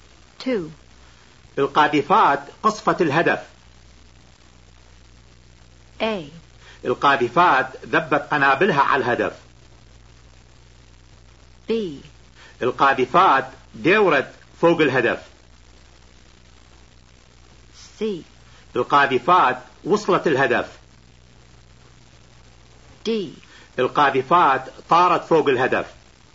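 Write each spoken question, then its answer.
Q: القاذفات قصفت الهدف.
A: A: القاذفات ذبت قنابلها على الهدف.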